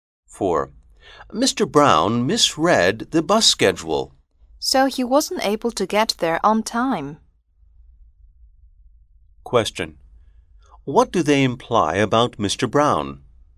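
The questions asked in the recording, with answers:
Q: What do they imply about Mr.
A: He arrived late because he misread the bus schedule.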